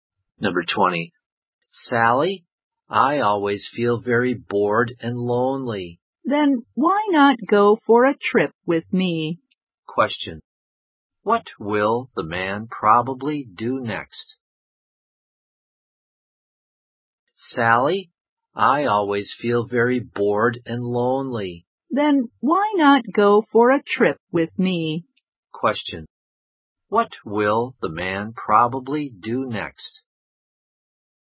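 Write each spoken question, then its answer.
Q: What will the man probably do next?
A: Go for a trip with Sally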